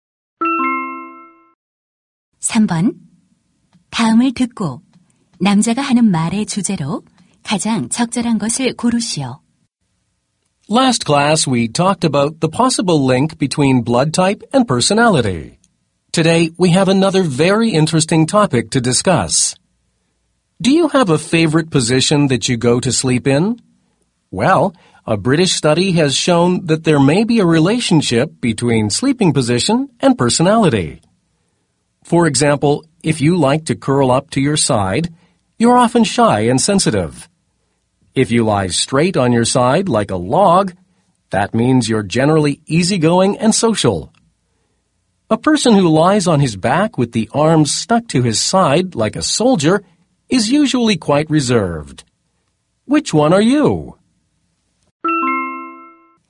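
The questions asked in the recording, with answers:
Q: 다음을 듣고 남자가 하는 말의 주제로 가장 적절한 것을 고르시오.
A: 수면 자세와 성격의 관계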